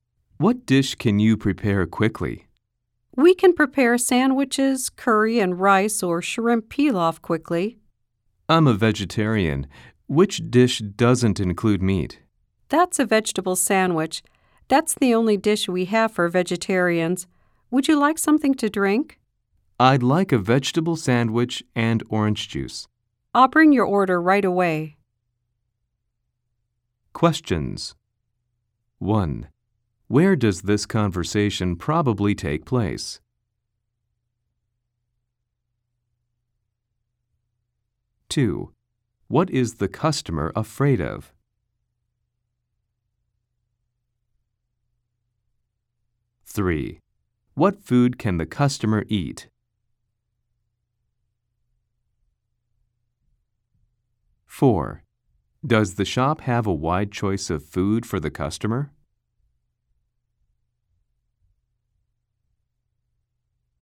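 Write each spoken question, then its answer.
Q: Where does this conversation probably take place?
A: In a restaurant

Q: What food can the customer eat?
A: A vegetable sandwich

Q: Does the shop have a wide choice of food for the customer?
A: No, the vegetable sandwich is the only vegetarian dish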